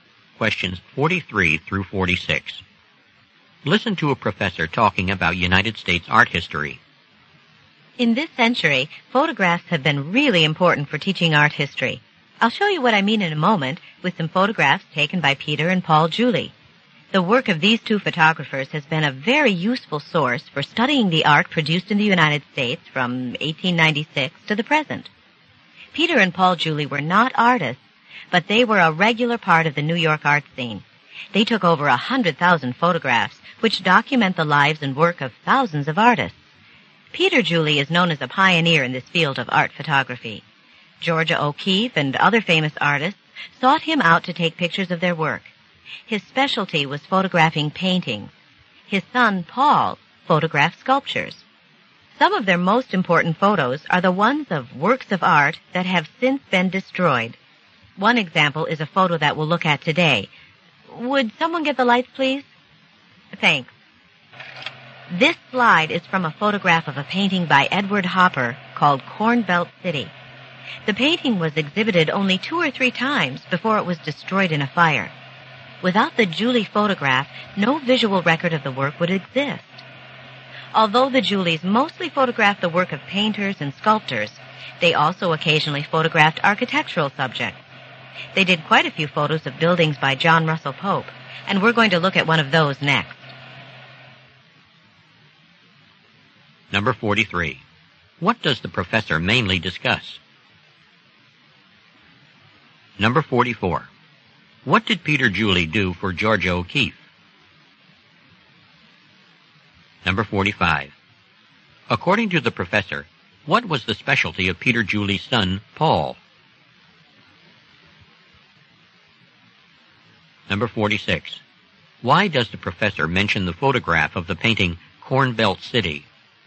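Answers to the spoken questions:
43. The photographs of art taken by Peter and Paul Julie
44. He took pictures of her work
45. Photographing sculptures
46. The painting was destroyed, so the photograph is the only visual record of it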